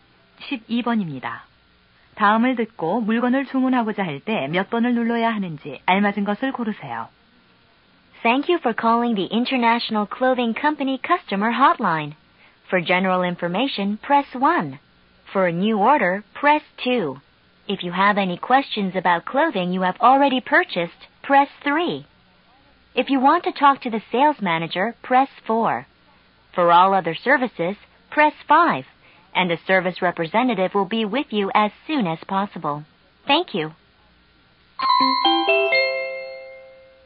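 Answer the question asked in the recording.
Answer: 2번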